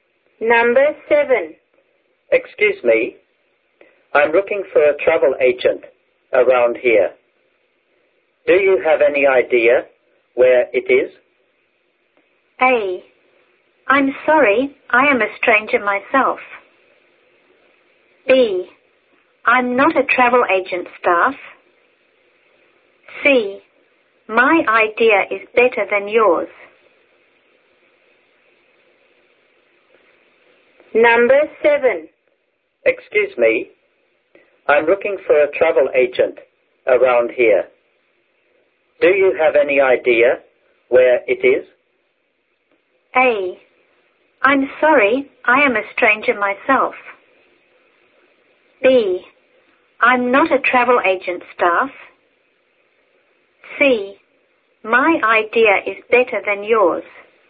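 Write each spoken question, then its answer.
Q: Excuse me, I'm looking for a travel agent around here. Do you have any idea where it is?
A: A: I'm sorry, I am a stranger myself.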